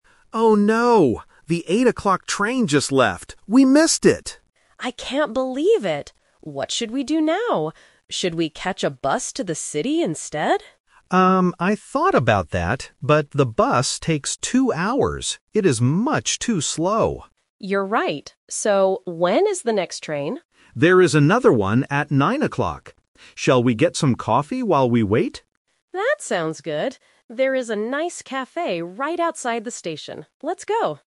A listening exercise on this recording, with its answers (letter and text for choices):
Listen to the conversation and choose the correct answer (A, B, or C).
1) What does the woman suggest doing first?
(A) Waiting for the 9:00 train.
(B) Taking a bus to the city.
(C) Going back home.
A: (B) Taking a bus to the city.

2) Why does the man refuse to take the bus?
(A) Because it is very slow.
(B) Because it costs a lot of money.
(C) Because there are no buses today.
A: (A) Because it is very slow.

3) What are they going to do right now?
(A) Catch the 8:00 train.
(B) Buy new train tickets.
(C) Get some coffee.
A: (C) Get some coffee.

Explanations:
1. When they miss the train, the woman asks, "Should we catch a bus to the city instead?". Option A is the Trap (waiting for the 9:00 train is their final decision, not her first suggestion). Option C is not mentioned.
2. The man says, "...the bus takes two hours. It is much too slow." Option B is a plausible reason for refusing public transport, but it is not mentioned. Option C is also not mentioned.
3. This is the Final Result (The Twist). The man suggests, "Shall we get some coffee while we wait?" and the woman agrees. Option A is the Trap (the 8:00 train is the one they already missed). Option B is not mentioned.